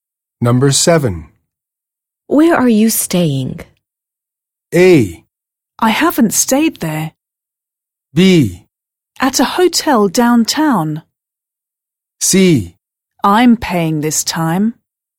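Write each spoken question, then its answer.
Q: Where are you staying?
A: B: At a hotel downtown.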